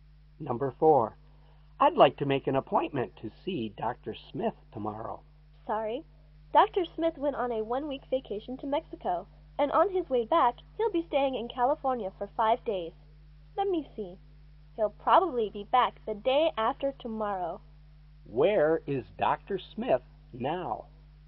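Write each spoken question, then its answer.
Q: Where is Dr. Smith now?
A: In California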